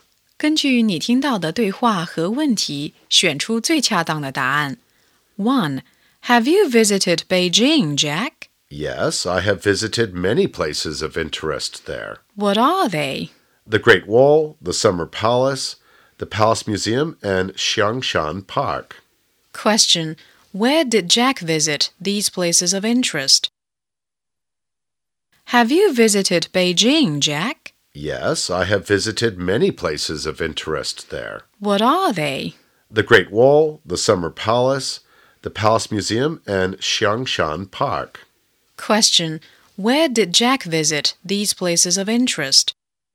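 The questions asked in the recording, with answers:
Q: Where did Jack visit these places of interest?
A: In Beijing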